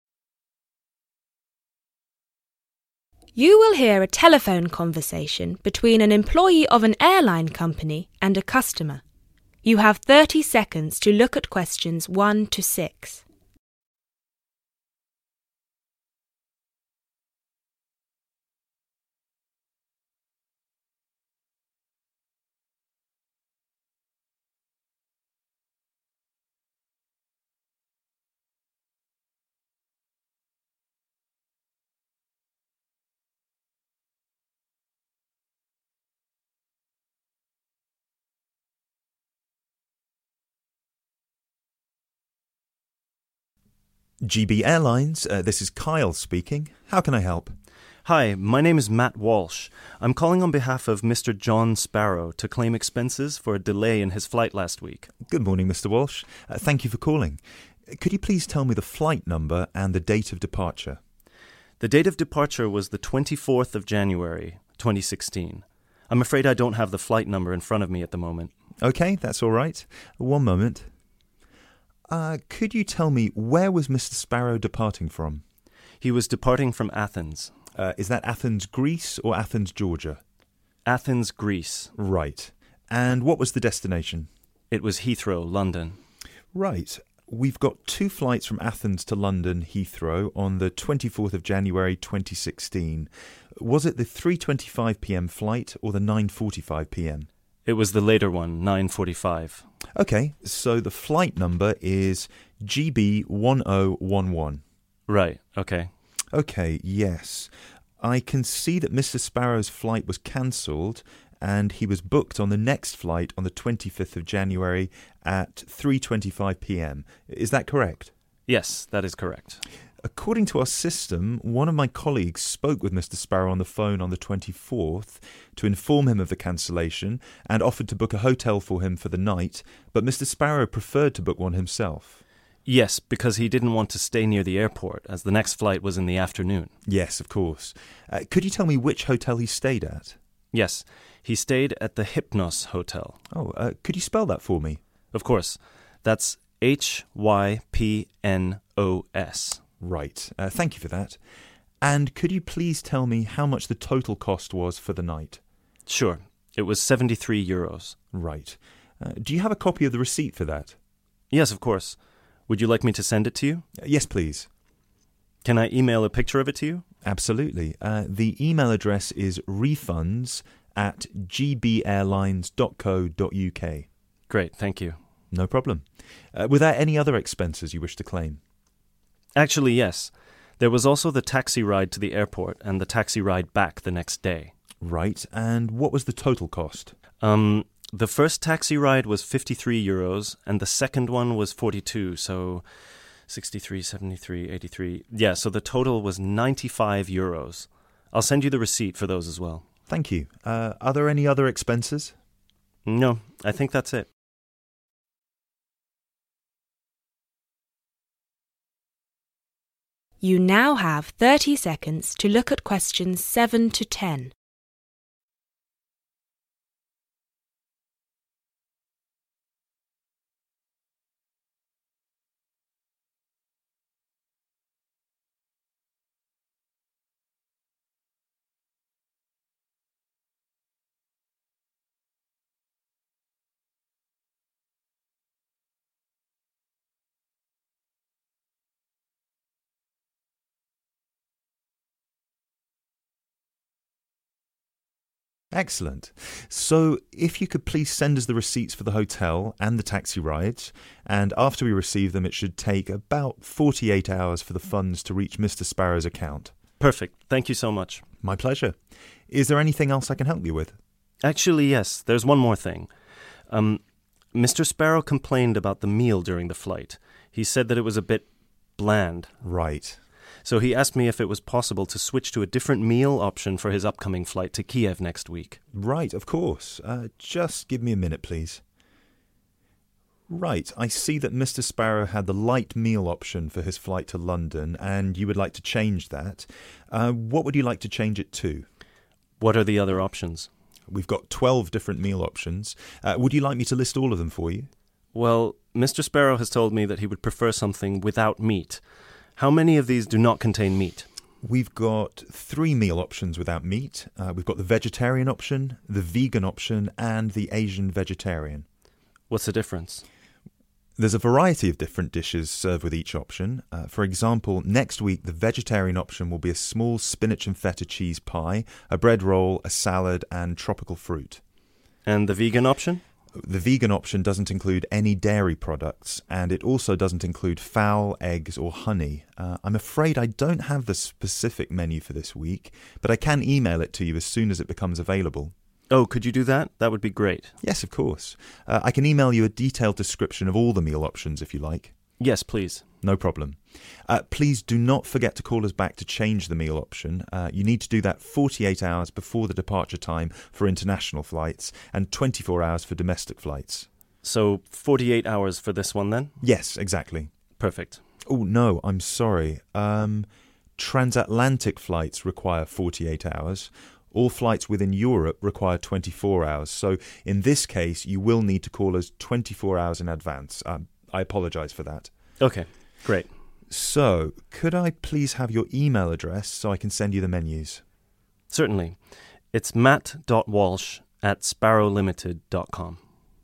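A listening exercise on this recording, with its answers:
Complete the form below. Write NO MORE THAN TWO WORDS AND/OR A NUMBER for each answer.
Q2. Date of Departure: 2............... 2016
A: 24th January

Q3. Flight: From 3............... to London Heathrow, UK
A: Athens

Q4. Departure Time: 4.............. p.m.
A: 9:45

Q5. Expenses Claimed: 5 Hotel, 73 euros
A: Hypnos

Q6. Taxis, 6.............. .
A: 95 euros

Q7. The customer had the................option for his previous flight.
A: light meal

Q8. There are three meal options without meat: vegetarian, vegan, and........... .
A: Asian vegetarian

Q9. The vegan option doesn't contain any............. , eggs, fowl, or honey.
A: dairy products

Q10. The meal option for the customer's flight to Kiev must be changed.................before the departure time.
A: 24 hours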